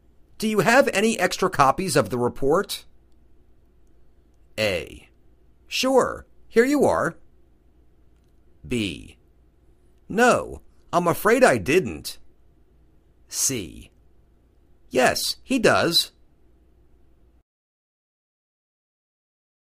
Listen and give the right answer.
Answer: Sure. Here you are.